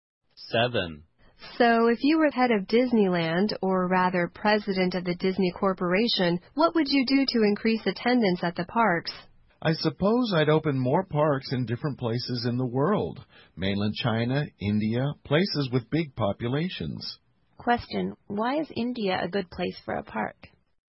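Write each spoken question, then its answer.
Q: why is India a good place for a park?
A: It has a big population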